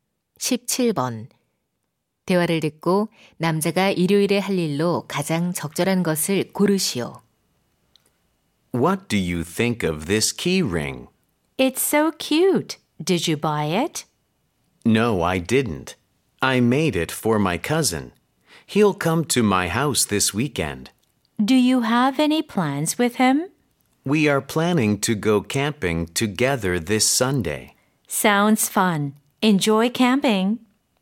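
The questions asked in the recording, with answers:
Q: 대화를 듣고 남자가 일요일에 할 일로 가장 적절한 것을 고르시오.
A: 캠핑 가기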